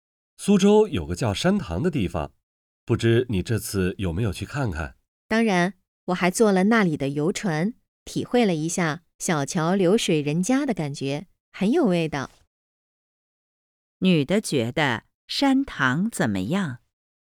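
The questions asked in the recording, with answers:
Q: 女的觉得山塘怎么样?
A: 很有味道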